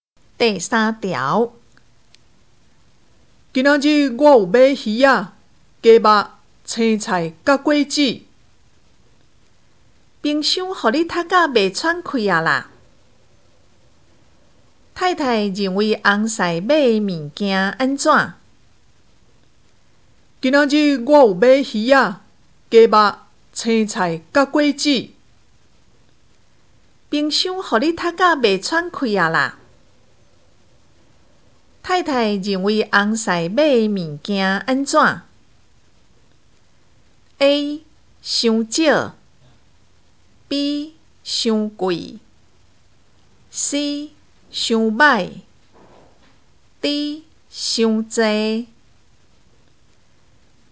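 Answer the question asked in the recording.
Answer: D: 伤侪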